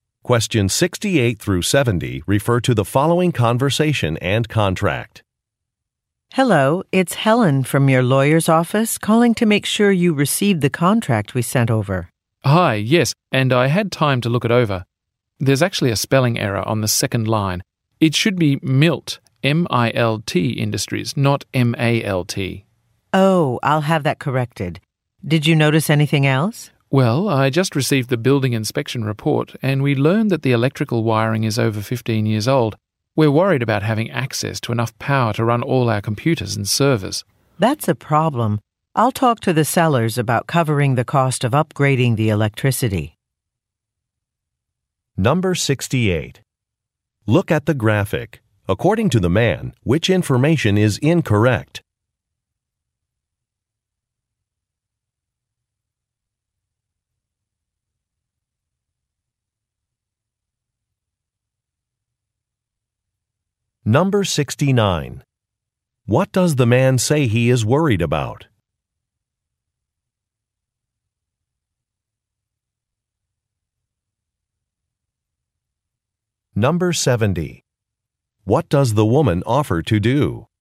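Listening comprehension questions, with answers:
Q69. What does the man say he is worried about?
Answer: The condition of an electrical system

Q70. What does the woman offer to do?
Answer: Negotiate with a seller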